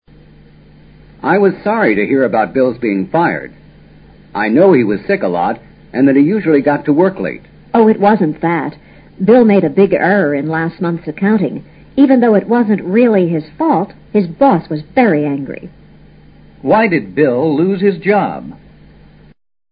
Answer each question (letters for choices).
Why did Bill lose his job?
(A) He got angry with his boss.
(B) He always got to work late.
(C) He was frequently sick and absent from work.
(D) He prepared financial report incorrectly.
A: D

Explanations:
她的话表明,身体不好,上班迟到浊他被解雇的真正原因。真正原因是他made a big error in last month's accounting。 accounting(借贷对照表)即financial report.